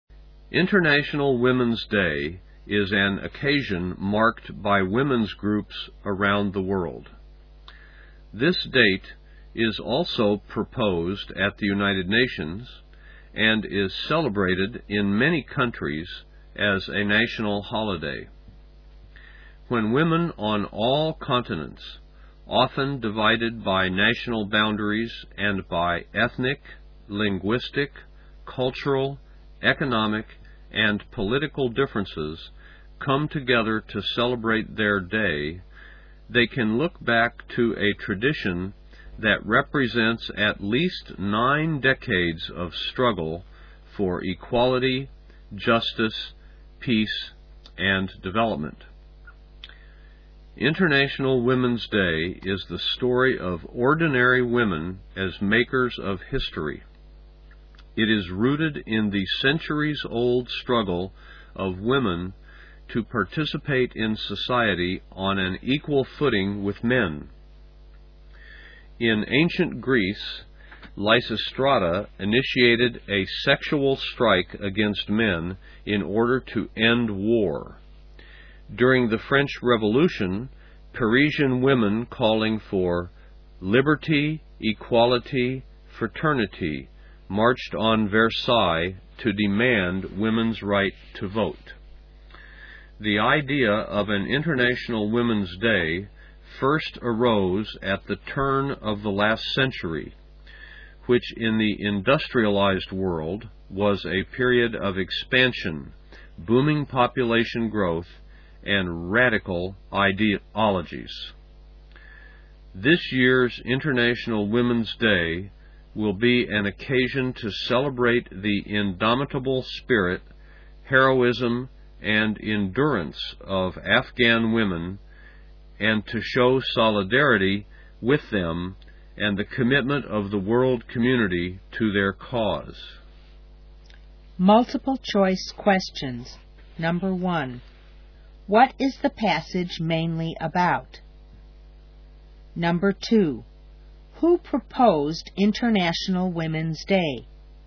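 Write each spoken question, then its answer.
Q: What is the passage mainly about?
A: International Women's Day and its history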